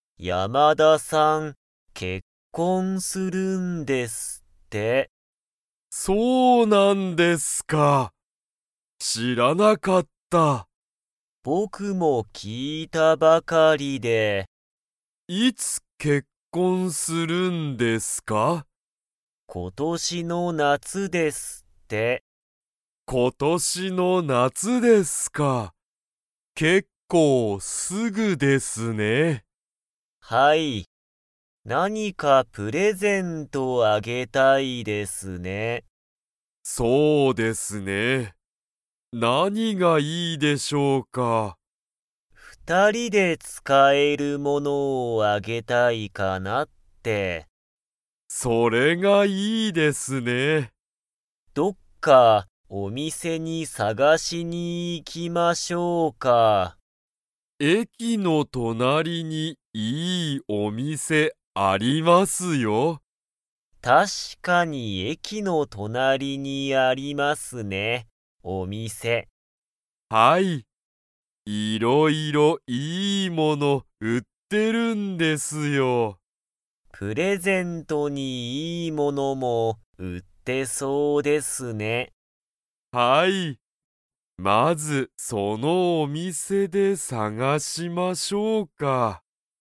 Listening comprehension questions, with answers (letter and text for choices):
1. 山田やまださんは、いつ結婚けっこんしますか?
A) 今年ことしの夏なつ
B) 今年ことしの冬ふゆ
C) 明日あした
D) 一年いちねん後ご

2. 二人ふたりは、お店みせにプレゼントを探さがしに 。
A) 行いく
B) 行いかない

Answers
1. A) 今年ことしの夏なつ
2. A) 行いく

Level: Level 3